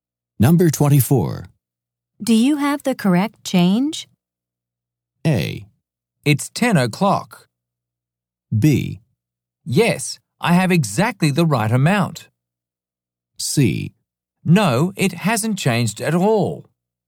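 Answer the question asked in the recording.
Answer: B: Yes, I have exactly the right amount.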